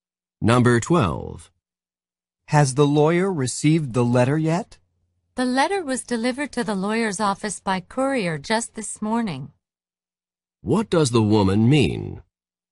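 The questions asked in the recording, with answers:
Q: What does the woman mean?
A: The lawyer received the letter this morning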